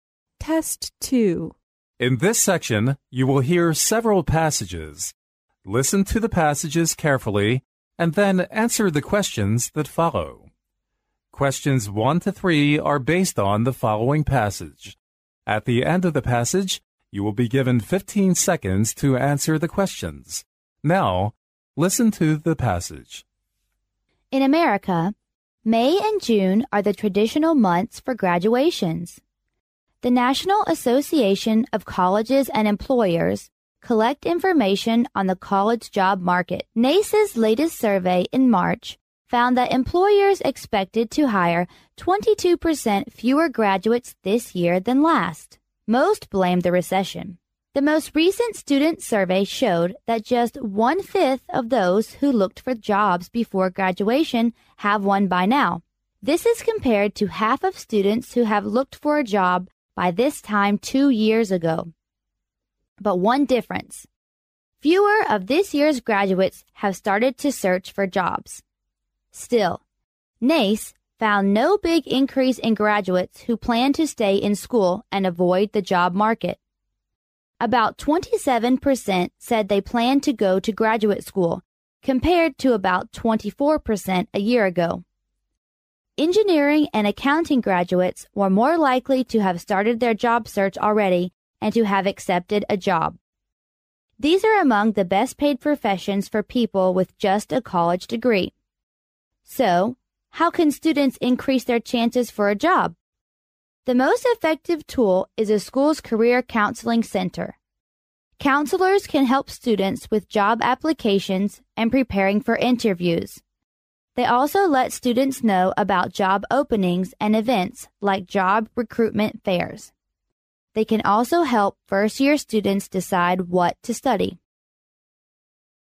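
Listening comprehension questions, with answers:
Now, listen to the passage.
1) In America, the traditional time for graduations is in_____.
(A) May.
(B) September.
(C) May and June.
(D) June and September.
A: (C) May and June.

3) Which is NOT mentioned as part of career counseling center's work?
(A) To help apply jobs.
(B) To recommend interns.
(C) To explain interview process.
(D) To introduce recruitment fairs.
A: (B) To recommend interns.

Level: 英语四级

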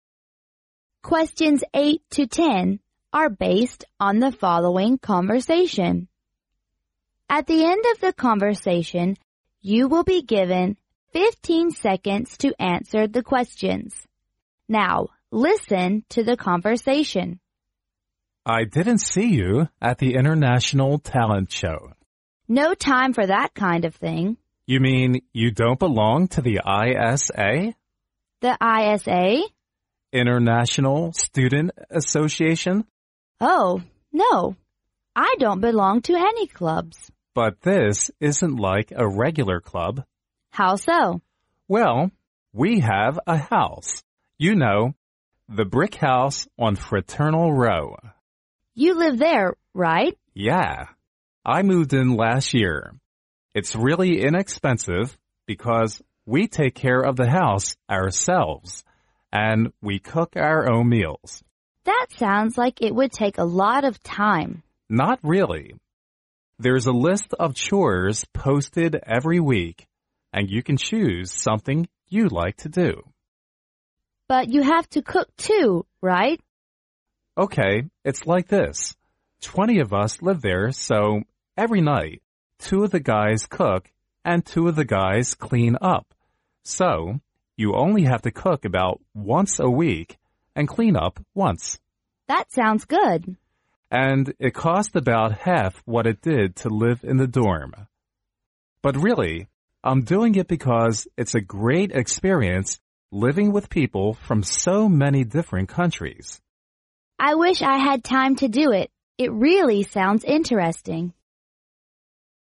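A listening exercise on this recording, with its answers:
Now,listen to the conversation.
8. What is the woman's attitude toward the International Talent Show?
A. Positive.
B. Negative.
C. Neutral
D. Skeptical.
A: B. Negative.

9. According to the man, how do they arrange the housework?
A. Each of them cooks about once a week.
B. Each of them cleans up twice a week.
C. They write a list of chores they like to do.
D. They choose their housework on a chore list.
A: D. They choose their housework on a chore list.

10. What is the actual reason the man lives in ISA?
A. It costs about half what it did to live in the dorm.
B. It doesn't take a lot of time to take care of the house and cook meals.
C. He really has a lot of fun living there with friends.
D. He thinks it's a great experience living with people worldwide.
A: D. He thinks it's a great experience living with people worldwide.

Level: 英语四级

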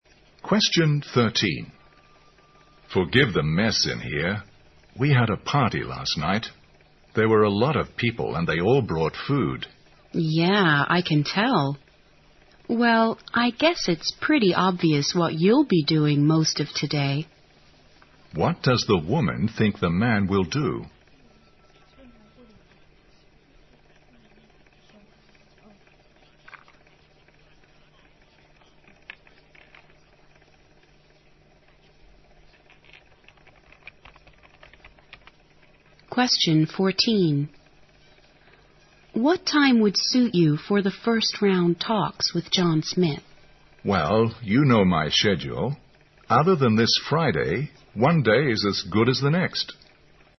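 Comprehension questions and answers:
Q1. What does the woman think the man will do?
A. Get more food and drinks.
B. Ask his friend to come over.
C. Tidy up the place.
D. Hold a party.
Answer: C. Tidy up the place.

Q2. What does the man mean?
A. The talks can be held any day except this Friday.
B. He could change his schedule to meet John Smith.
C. The first-round talks should start as soon as possible.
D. The woman should contact John Smith first.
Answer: A. The talks can be held any day except this Friday.

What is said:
M: Forgive the mess in here. We had a party last night. There were a lot of people and they all brought food
W: Yeah, I can tell. Well, I guess it's pretty obvious what you'll be doing most of today.
Q: What does the woman think the man will do?
W: What time would suit you for the first round talks with John Smith?
M: Well, you know my schedule. Other than this Friday, one day is as good as the next.

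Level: 大学英语四级

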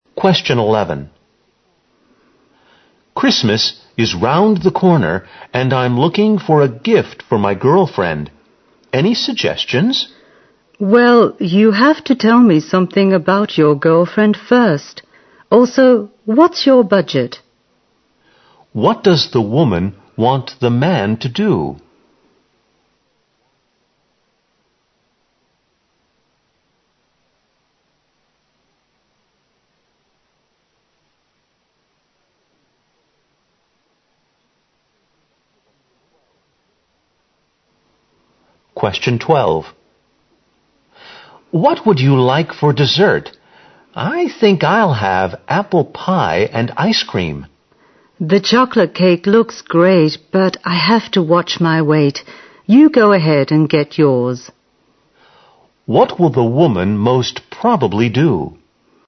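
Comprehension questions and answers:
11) What does the woman want the man to do?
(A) Plan his budget carefully.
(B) Give her more information.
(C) Ask someone else for advice.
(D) Buy a gift for his girlfriend.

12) What will the woman most probably do?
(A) She'll have some chocolate cake.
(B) She'll take a look at the menu.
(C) She'll go without dessert.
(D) She'll prepare the dinner.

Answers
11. (B) Give her more information.
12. (C) She'll go without dessert.

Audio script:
M: Christmas is round the corner and I'm looking for a gift for my girlfriend. Any suggestions?
W: Well, you have to tell me something about your girlfriend first. Also, what's your budget?
Q: What does the woman want the man to do?
M: What would you like for dessert? I think I'll have apple pie and ice cream.
W: The chocolate cake looks great. But I have to watch my weight, you go ahead and get yours.
Q: What will the woman most probably do?

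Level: 大学英语四级

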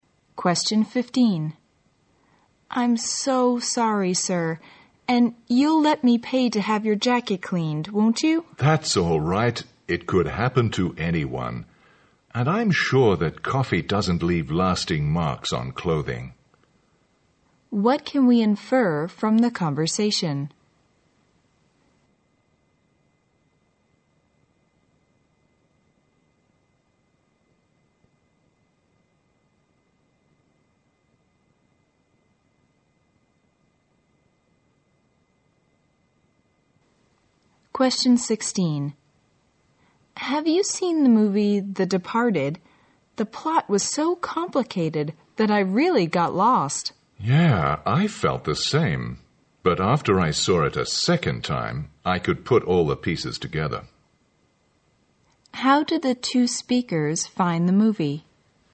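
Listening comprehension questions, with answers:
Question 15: What can we infer from the conversation?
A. The man blamed the woman for being careless.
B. The man misunderstood the woman's apology.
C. The woman offered to pay for the man's coffee.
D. The woman spilt coffee on the man's jacket.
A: D. The woman spilt coffee on the man's jacket.

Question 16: How did the two speakers find the movie?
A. Extremely tedious.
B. Hard to understand.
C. Lacking a good plot.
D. Not worth seeing twice.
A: B. Hard to understand.

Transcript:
W: I'm so sorry sir, and you'll let me pay to have your jacket cleaned, won't you?
M: That's all right. It could happen to anyone. And I'm sure that coffee doesn't leave lasting marks on clothing.
Q: What can we infer from the conversation?
W: Have you seen the movie 'The Departed'? The plot was so complicated that I really got lost.
M: Yeah, I felt the same, but after I saw it a second time, I could put all the pieces together.
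Q: How did the two speakers find the movie?

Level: 大学英语四级

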